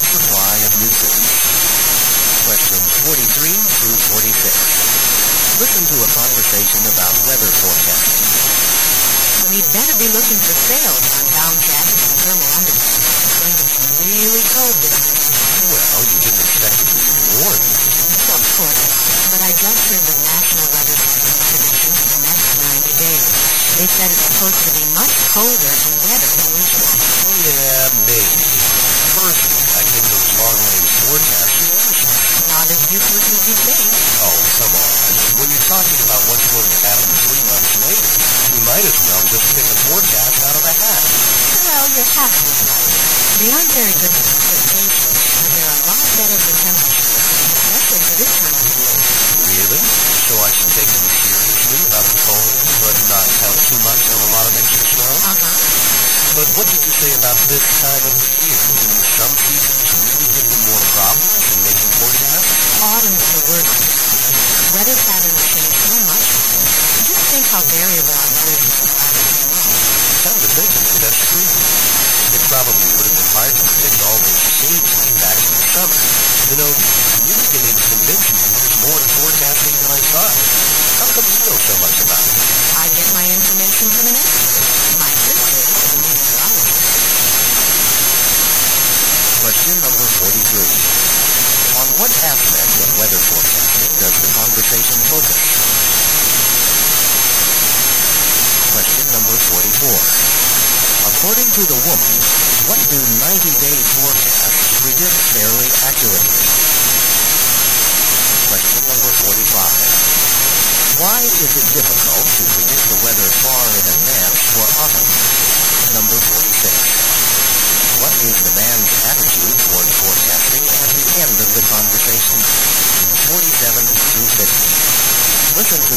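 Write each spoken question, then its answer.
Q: On what aspect of weather forecasting does the conversation focus?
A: How accurate long-range forecasts are

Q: According to the woman, what do 90-day forecasts predict fairly accurately?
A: Temperature

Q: Why is it difficult to predict the weather far in advance for autumn?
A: Weather patterns change a lot in autumn

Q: What is the man's attitude toward forecasting at the end of the conversation?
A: He thinks there is more to it than he thought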